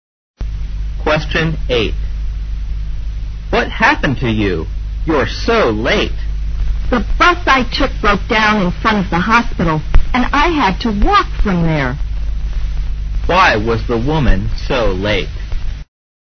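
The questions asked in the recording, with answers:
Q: Why was the woman so late?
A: Her bus broke down and she had to walk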